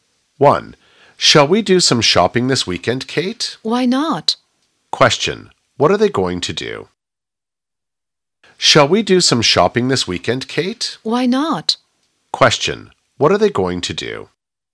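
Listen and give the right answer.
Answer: Go shopping this weekend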